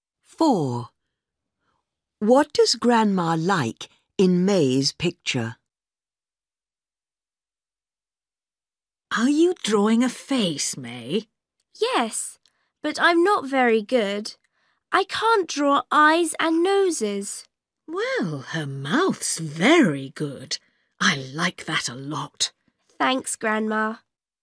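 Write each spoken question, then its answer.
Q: What does Grandma like in May's picture?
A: Her mouth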